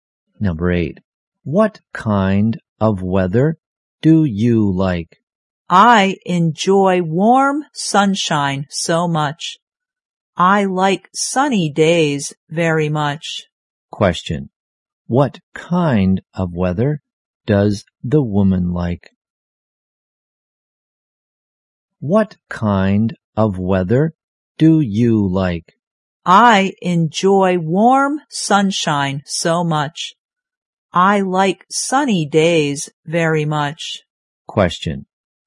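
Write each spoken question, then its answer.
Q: Question, what kind of weather does the woman like?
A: Sunny weather.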